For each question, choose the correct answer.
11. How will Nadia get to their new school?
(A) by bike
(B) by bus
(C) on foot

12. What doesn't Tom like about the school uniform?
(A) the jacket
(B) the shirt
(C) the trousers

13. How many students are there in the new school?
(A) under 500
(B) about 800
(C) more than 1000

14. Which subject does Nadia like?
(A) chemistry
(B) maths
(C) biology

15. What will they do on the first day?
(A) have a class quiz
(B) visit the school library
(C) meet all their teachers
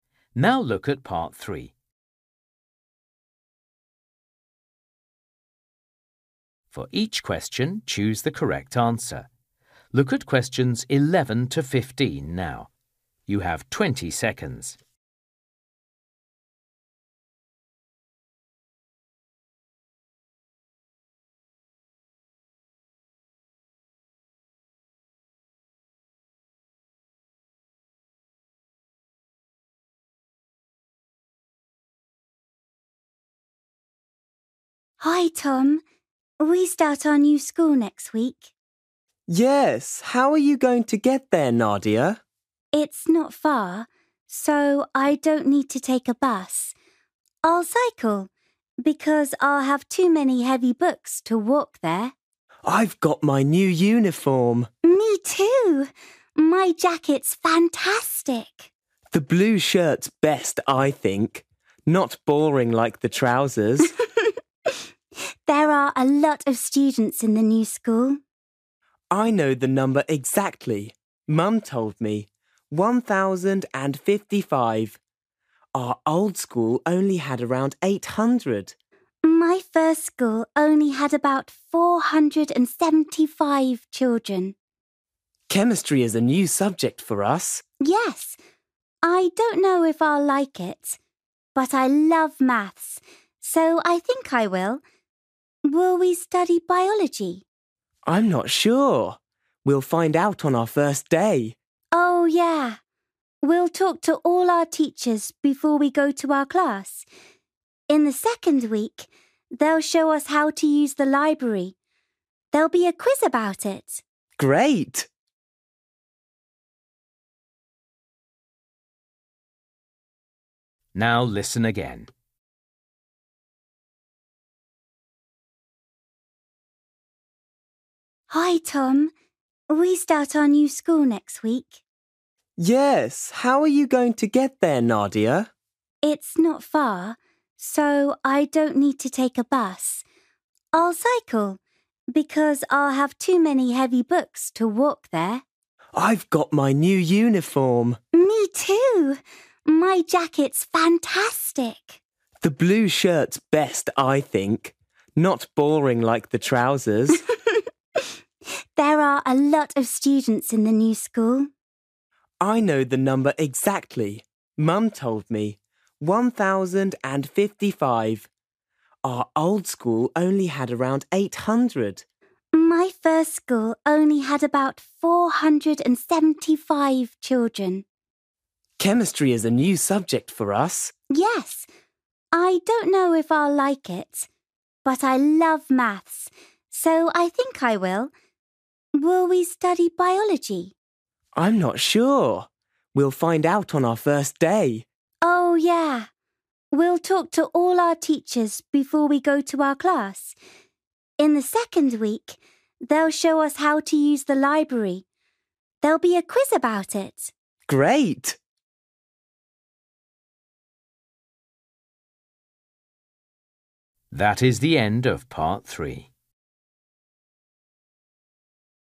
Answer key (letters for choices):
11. A
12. C
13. C
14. B
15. C

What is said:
Nadia: Hi, Tom. We start our new school next week.
Tom: Yes, how are you going to get there, Nadia?
Nadia: It's not far, so I don't need to take a bus. I'll cycle because I'll have too many heavy books to walk there.
Tom: I've got my new uniform.
Nadia: Me too! My jacket's fantastic!
Tom: The blue shirt's best, I think. Not boring like the trousers!
Nadia: There are a lot of students in the new school.
Tom: I know the number exactly. Our told school only had around eight hundred.
Tom: Chemistry is a new subject for us.
Nadia: Yes, I don't know if I'll like it, but I love maths, so I think I will. Will we study biology?
Tom: I'm not sure. We'll find out on our first day.
Nadia: Oh yeah, we'll talk to all our teachers before we go to our class. In the second week, they'll show us how to use the library. There'll be a quiz about it.
Tom: Great!

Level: KET (A2)